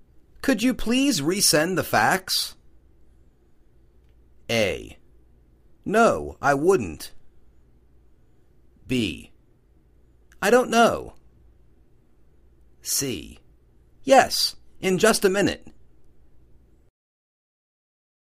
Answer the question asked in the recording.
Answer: Yes, in just a minute.